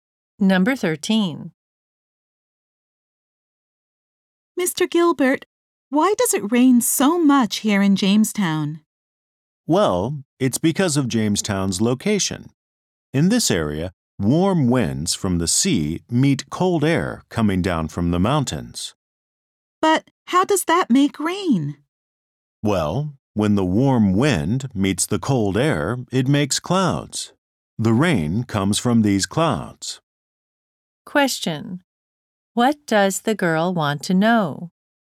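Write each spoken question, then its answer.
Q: What does the girl want to know?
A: Why it rains so much in Jamestown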